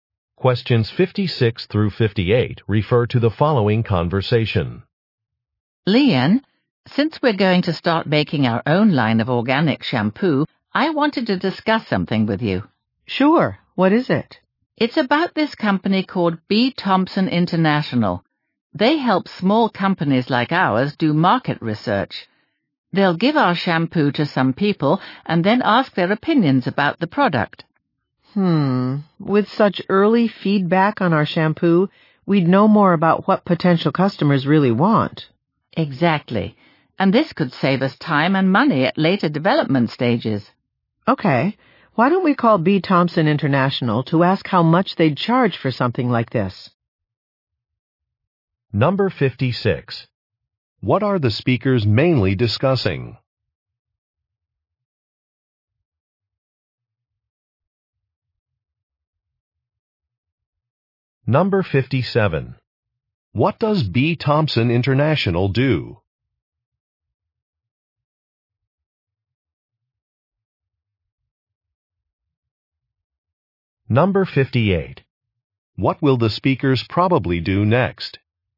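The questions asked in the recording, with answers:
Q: What are the speakers mainly discussing?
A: Market research for their new organic shampoo

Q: What does B. Thompson International do?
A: Helps small companies do market research

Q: What will the speakers probably do next?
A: Call B. Thompson International to ask about prices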